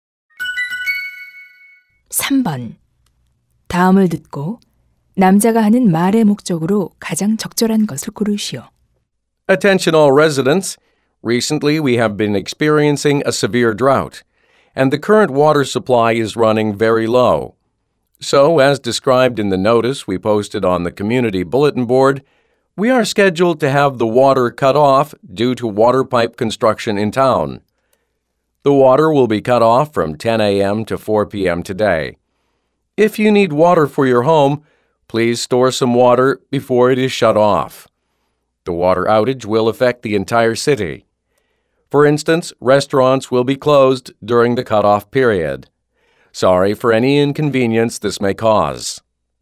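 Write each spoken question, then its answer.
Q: 다음을 듣고 남자가 하는 말의 목적으로 가장 적절한 것을 고르시오.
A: 오늘 오전 10시부터 오후 4시까지 단수된다는 것을 알리려고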